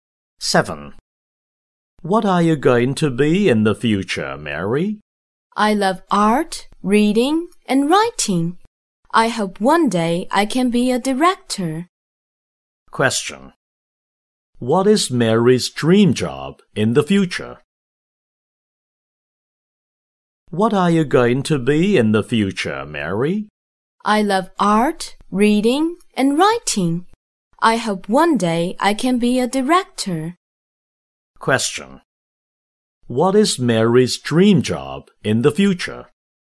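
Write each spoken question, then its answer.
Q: What is Mary's dream job in the future?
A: A director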